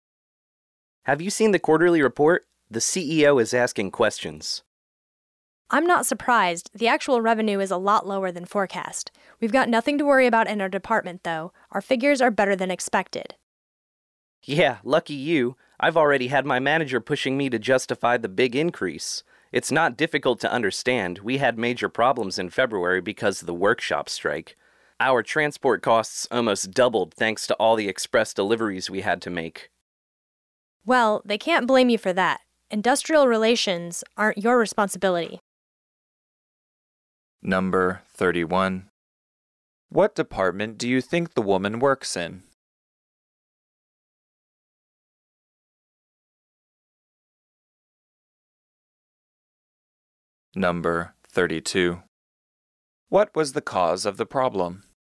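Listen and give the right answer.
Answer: A workshop strike in February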